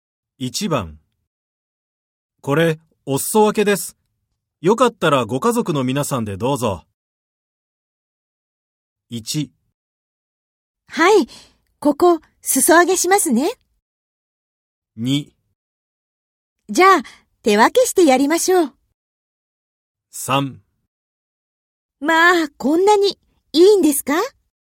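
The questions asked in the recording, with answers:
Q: これ、お裾分けです。よかったらご家族の皆さんでどうぞ。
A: 3: まあ、こんなにいいんですか?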